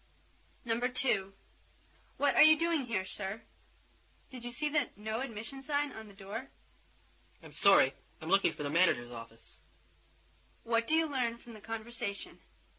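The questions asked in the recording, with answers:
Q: What do you learn from the conversation?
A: The man went into a no-admission area by mistake while looking for the manager's office.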